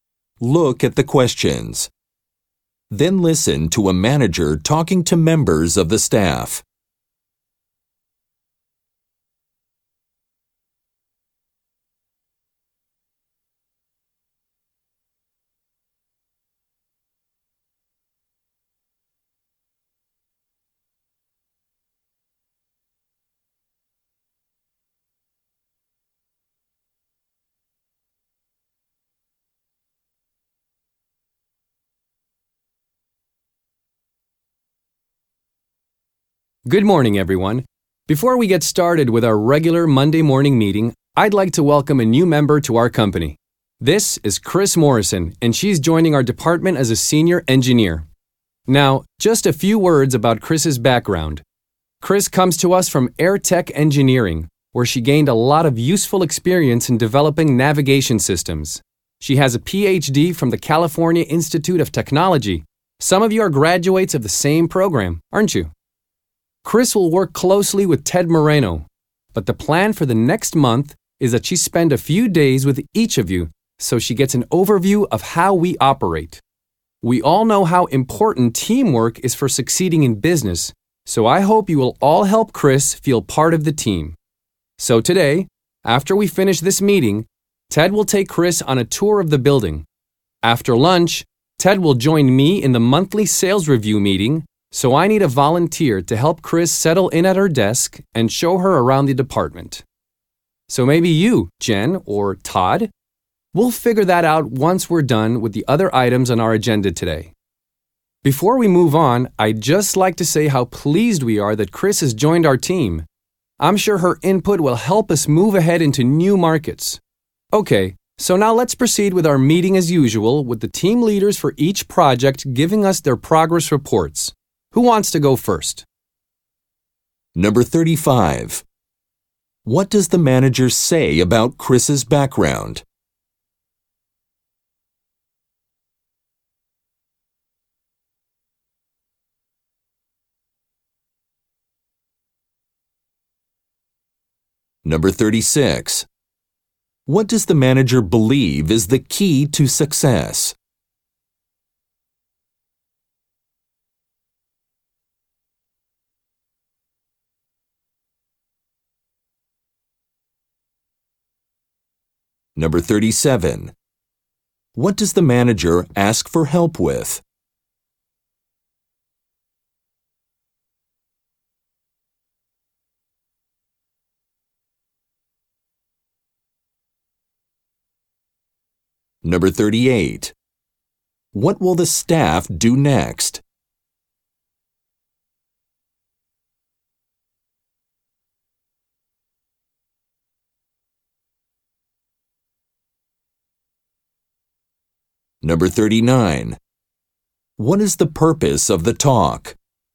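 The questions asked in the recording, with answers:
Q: What does the manager say about Chris's background?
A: She has experience developing navigation systems and a PhD from Caltech

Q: What does the manager believe is the key to success?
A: Teamwork

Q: What does the manager ask for help with?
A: Helping Chris settle in at her desk and showing her around the department

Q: What will the staff do next?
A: Hear progress reports from the team leaders

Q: What is the purpose of the talk?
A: To introduce a new employee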